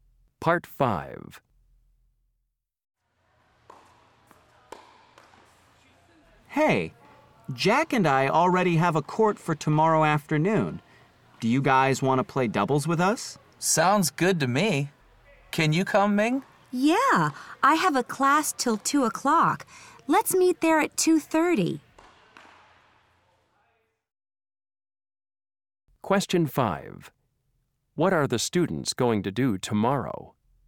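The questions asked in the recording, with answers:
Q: What are the students going to do tomorrow?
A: Play doubles tennis at 2:30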